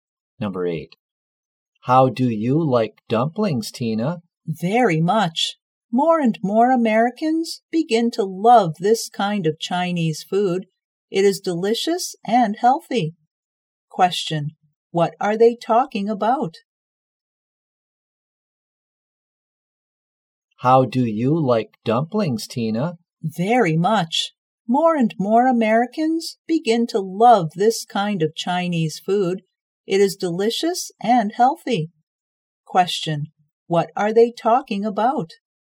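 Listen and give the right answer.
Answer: Dumplings (Chinese food).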